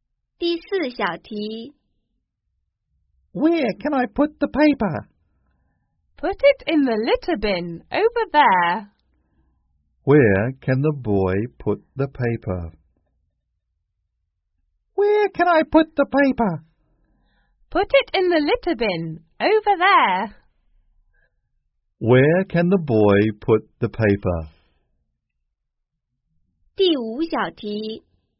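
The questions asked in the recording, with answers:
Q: Where can the boy put the paper?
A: In the litter bin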